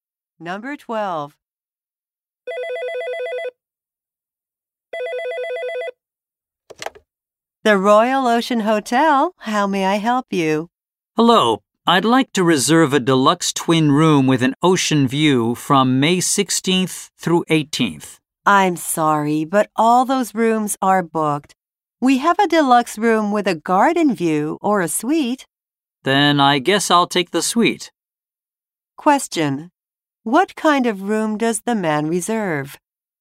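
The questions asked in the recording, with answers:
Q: What kind of room does the man reserve?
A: A suite.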